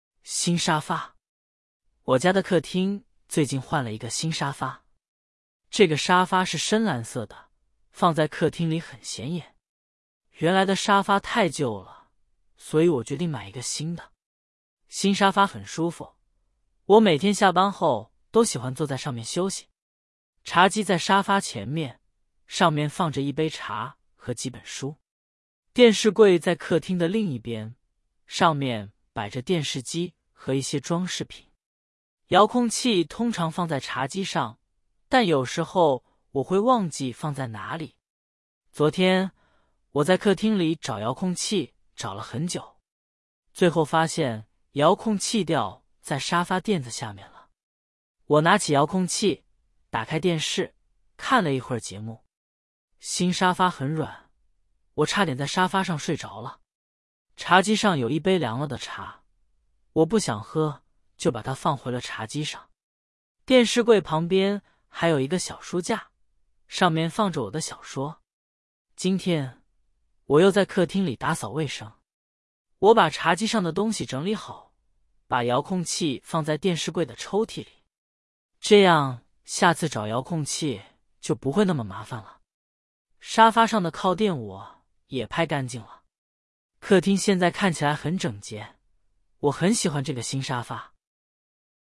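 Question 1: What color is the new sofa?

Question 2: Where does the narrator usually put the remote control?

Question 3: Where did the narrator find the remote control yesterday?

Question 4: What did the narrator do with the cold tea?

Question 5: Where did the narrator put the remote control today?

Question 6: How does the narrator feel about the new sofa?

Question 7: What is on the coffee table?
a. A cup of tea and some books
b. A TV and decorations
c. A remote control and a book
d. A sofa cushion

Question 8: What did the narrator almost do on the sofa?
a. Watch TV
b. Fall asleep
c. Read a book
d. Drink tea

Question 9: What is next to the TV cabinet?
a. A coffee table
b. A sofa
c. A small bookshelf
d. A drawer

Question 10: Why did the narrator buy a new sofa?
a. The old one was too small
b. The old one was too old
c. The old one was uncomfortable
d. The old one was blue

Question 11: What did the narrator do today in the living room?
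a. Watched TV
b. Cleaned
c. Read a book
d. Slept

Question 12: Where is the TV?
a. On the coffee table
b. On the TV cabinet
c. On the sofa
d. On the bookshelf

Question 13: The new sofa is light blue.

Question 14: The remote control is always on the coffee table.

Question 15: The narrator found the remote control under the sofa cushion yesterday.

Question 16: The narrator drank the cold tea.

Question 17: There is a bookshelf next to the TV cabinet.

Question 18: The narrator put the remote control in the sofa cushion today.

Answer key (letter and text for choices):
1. Dark blue
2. On the coffee table
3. Under the sofa cushion
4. Didn't drink it and put it back on the coffee table
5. In the drawer of the TV cabinet
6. Really likes it; it is comfortable
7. a. A cup of tea and some books
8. b. Fall asleep
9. c. A small bookshelf
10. b. The old one was too old
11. b. Cleaned
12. b. On the TV cabinet
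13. False
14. False
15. True
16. False
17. True
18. False

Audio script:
新沙发
我家的客厅最近换了一个新沙发。这个沙发是深蓝色的,放在客厅里很显眼。原来的沙发太旧了,所以我决定买一个新的。新沙发很舒服,我每天下班后都喜欢坐在上面休息。茶几在沙发前面,上面放着一杯茶和几本书。电视柜在客厅的另一边,上面摆着电视机和一些装饰品。遥控器通常放在茶几上,但有时候我会忘记放在哪里。
昨天,我在客厅里找遥控器找了很久。最后发现遥控器掉在沙发垫子下面了。我拿起遥控器,打开电视,看了一会儿节目。新沙发很软,我差点在沙发上睡着了。茶几上有一杯凉了的茶,我不想喝,就把它放回了茶几上。电视柜旁边还有一个小书架,上面放着我的小说。
今天,我又在客厅里打扫卫生。我把茶几上的东西整理好,把遥控器放在电视柜的抽屉里。这样下次找遥控器就不会那么麻烦了。沙发上的靠垫我也拍干净了。客厅现在看起来很整洁,我很喜欢这个新沙发。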